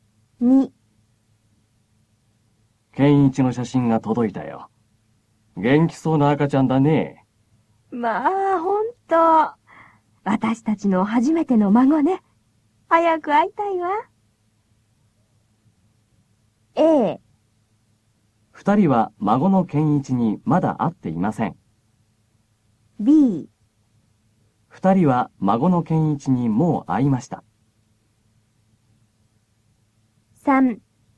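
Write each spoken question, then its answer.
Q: A。二人は孫の健一にまだ会っていません。B。二人は孫の健一にもう会いました。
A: A: 二人は孫の健一にまだ会っていません。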